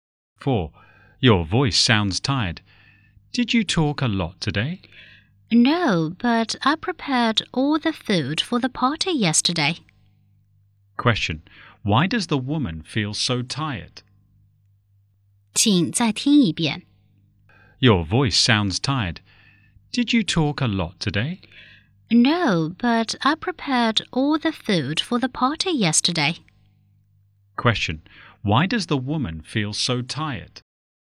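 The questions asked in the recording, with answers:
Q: Question, why does the woman feel so tired?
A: She prepared all the food for the party yesterday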